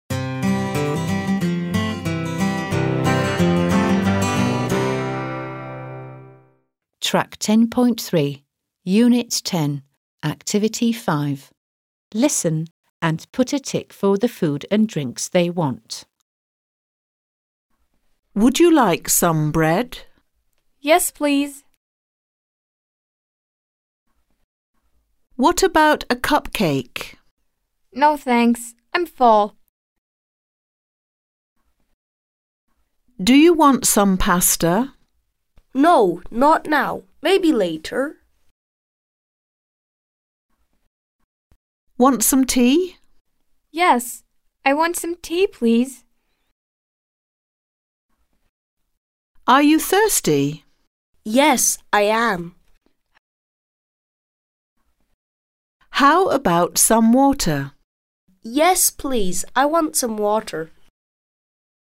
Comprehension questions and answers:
5. Listen and put a tick (√) for the food and drinks they want.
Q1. cupcake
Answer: X

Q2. pasta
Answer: X

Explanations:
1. What about a cupcake? (Bir kek nasıl olur?) No thanks, I'm full. (Hayır teşekkürler, doydum.)
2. Do you want some pasta? (Biraz makarna ister misin?) No, not now, maybe later. (Hayır, şimdi değil, belki sonra.)

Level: 4. Sınıf